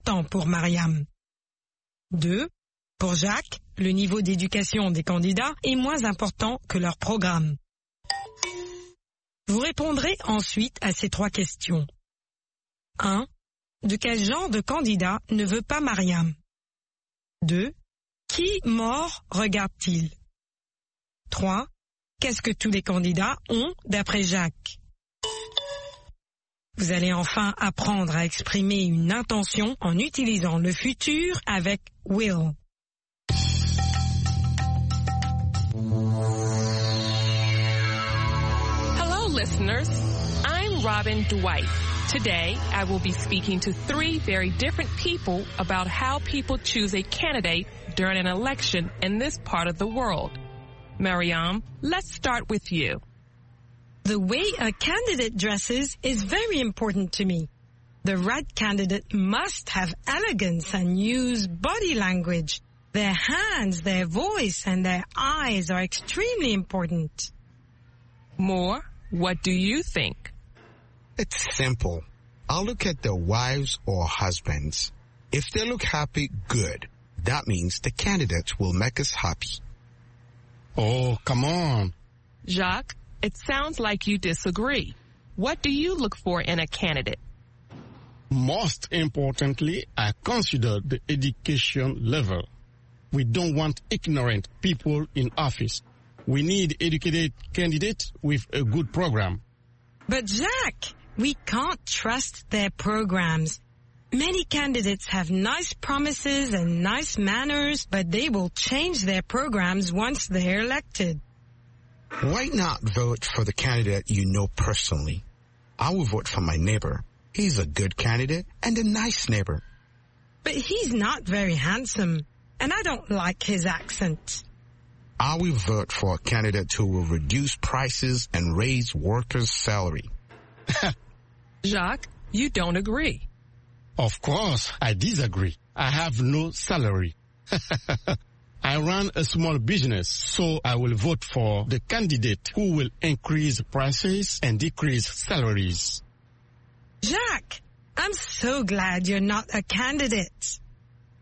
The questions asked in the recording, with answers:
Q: Pour Jacques, le niveau d'éducation des candidats est moins important que leur programme.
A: L'énoncé 2 est faux.

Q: Qui mort regarde-t-il?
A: Les femmes des candidats et les maris des candidates.